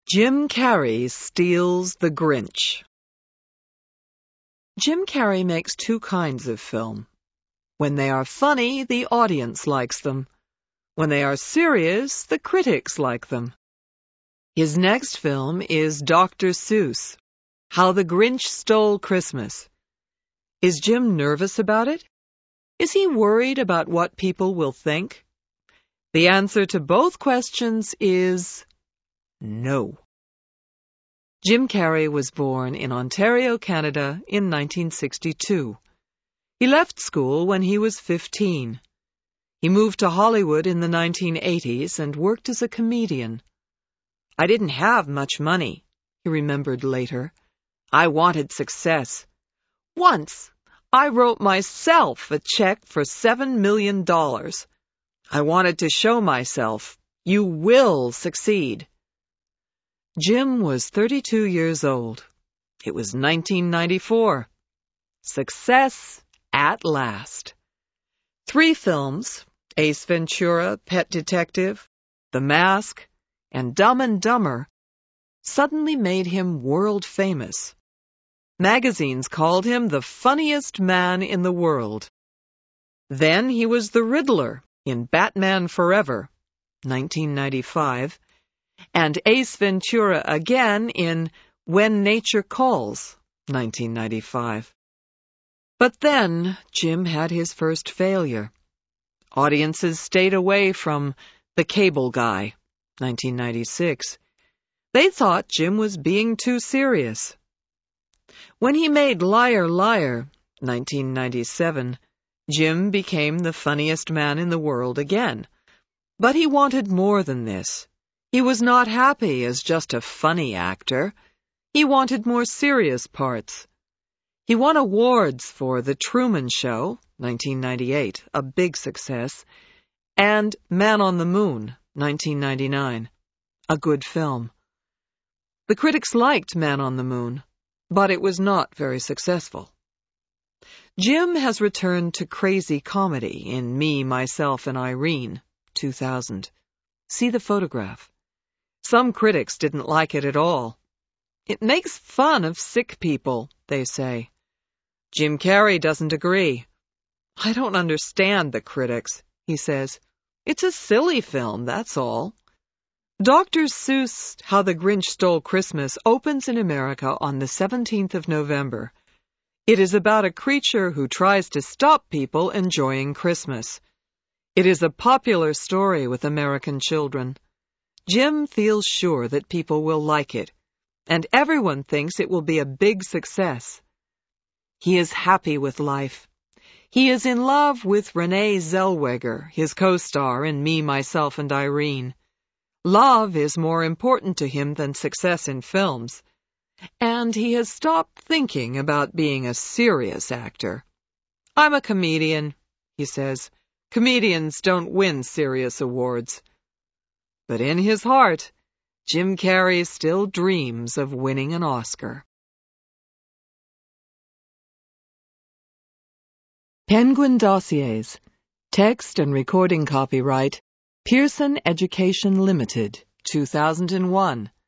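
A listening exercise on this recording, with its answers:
Answer these questions TRUE or FALSE:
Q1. All of Jim Carrey's films have been great successes.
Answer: FALSE

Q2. Jim became world-famous soon after he moved to Hollywood.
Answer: FALSE

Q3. Liar Liar is a more serious film.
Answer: FALSE

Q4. Jim Carrey has never won an award.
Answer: FALSE

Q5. Some critics don't like Me, Myself and Irene because it isn't funny enough.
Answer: FALSE

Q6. The Grinch seems to be an unpleasant creature.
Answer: TRUE

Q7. Success is not the most important thing in Jim's life now.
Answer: TRUE

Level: HIGH INTERMEDIATE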